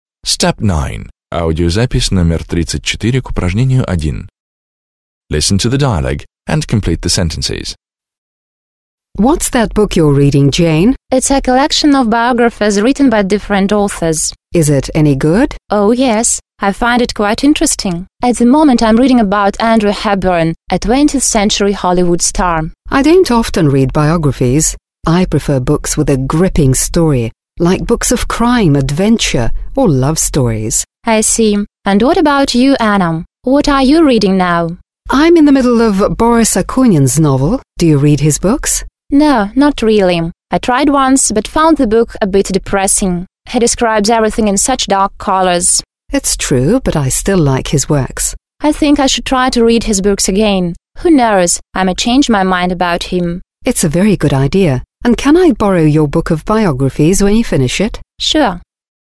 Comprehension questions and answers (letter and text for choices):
1. Listen to the dialogue, (34), and complete the sentences below.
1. Jane is reading a book of biographies by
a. a well−known writer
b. a Hollywood writer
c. several writers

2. Anna says she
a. never reads biographies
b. seldom reads biographies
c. often reads biographies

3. Jane says she doesn't like Akunin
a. and will never read his books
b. but doesn't mind reading something by him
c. but thinks reading his novels is a good idea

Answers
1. c. several writers
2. b. seldom reads biographies
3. b. but doesn't mind reading something by him

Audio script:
Jane: It's a collection of biographies written by different authors.
Anna: Is it any good? – Она хорошая?
Jane: Oh, yes. I find it quite interesting. At the moment I'm reading about Audrey Hepburn, a 20th century Hollywood star.
Anna: I don't often read biographies. I prefer books with a gripping story like crime, adventure or love stories.
Jane: I see. And what about you, Anna? What are you reading now?
Anna: I'm in the middle of Boris Akunin's novel. Do you read his books?
Jane: No, not really. I tried once but found the book a bit depressing. He describes everything in such dark ways.
Anna: That's true, but I still like his works.
Jane: I think I should try to read his books again. Who knows, I may change my mind about him.
Anna: It's a very good idea. And can I borrow your book of biographies when you finish it?

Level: 9 класс